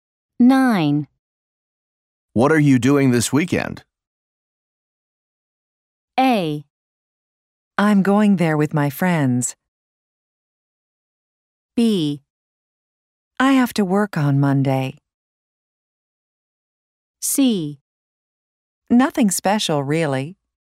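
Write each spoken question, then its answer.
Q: What are you doing this weekend?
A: C: Nothing special, really.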